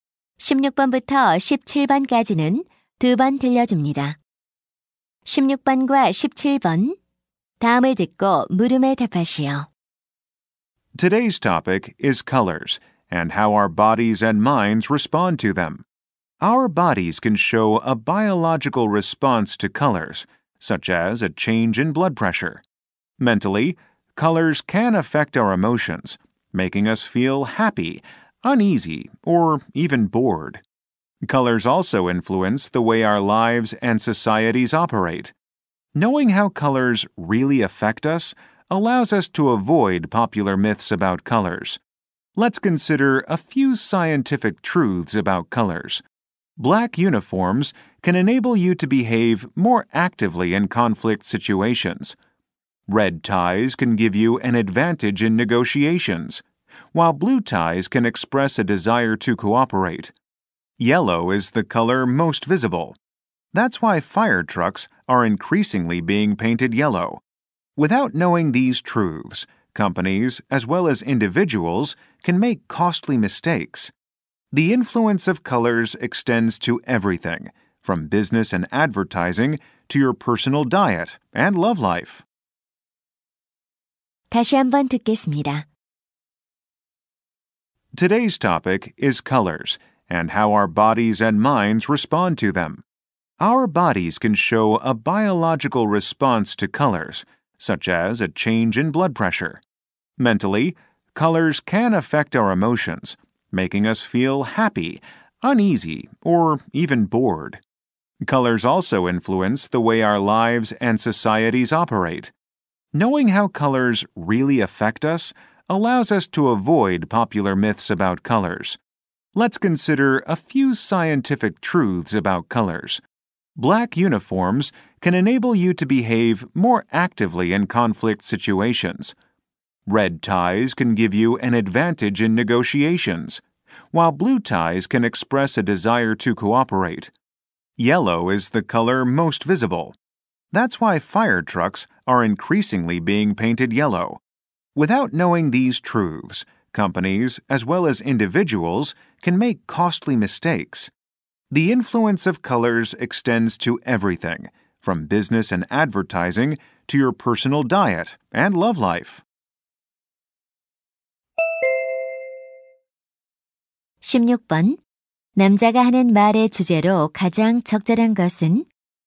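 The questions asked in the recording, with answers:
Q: 남자가 하는 말의 주제로 가장 적절한 것은?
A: 색깔이 우리 몸과 마음, 삶에 미치는 영향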